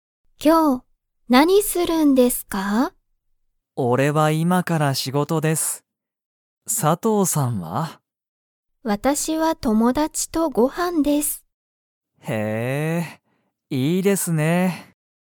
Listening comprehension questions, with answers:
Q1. 小島こじまさんは、____仕事しごとだ。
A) 一緒いっしょに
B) 今いまから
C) この前まえ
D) 佐藤さとうさんと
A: 今いまから

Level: Level 1

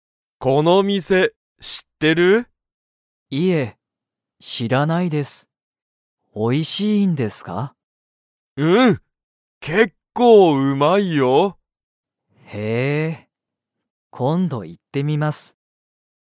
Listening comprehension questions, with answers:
Comprehension Quiz (Skip if you don't understand the conversation yet)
その店みせは、____。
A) 結構けっこううまい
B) 全然ぜんぜん美味おいしくない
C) たぶん新あたらしい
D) まだ早はやい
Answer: 結構けっこううまい

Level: Level 1

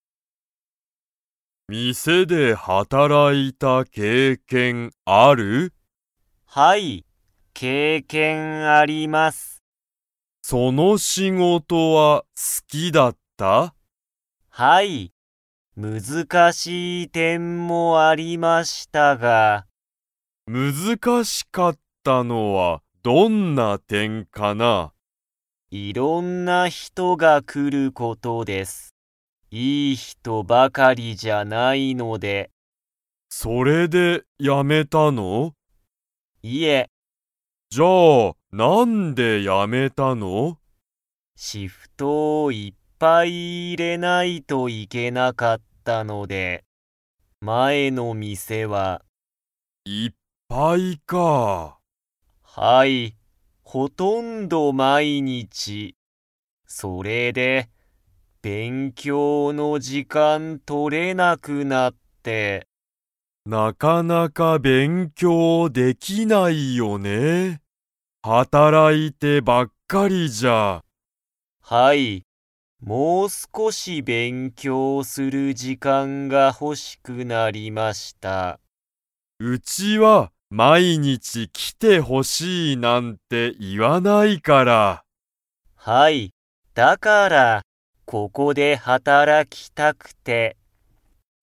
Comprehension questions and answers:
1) 加藤(かとう)さんは、店(みせ)で働(はたら)いた経験(けいけん)はありますか?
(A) はい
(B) いいえ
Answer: はい

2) 加藤(かとう)さんは、____の時間(じかん)が取(と)れなかったので、前(まえ)のお店(みせ)をやめた。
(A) チケット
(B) 仕事(しごと)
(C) シフト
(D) 勉強(べんきょう)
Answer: 勉強(べんきょう)

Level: Level 2

